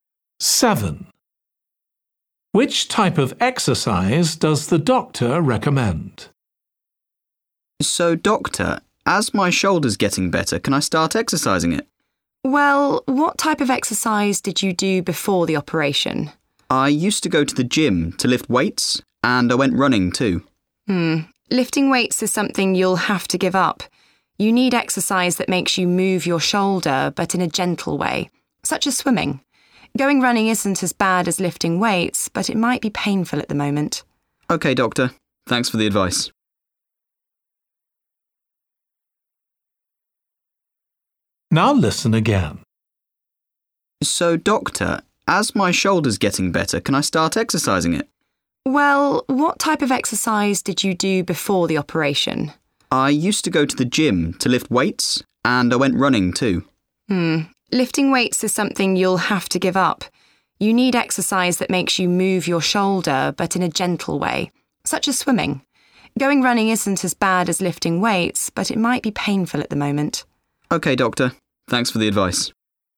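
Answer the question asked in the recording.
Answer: swimming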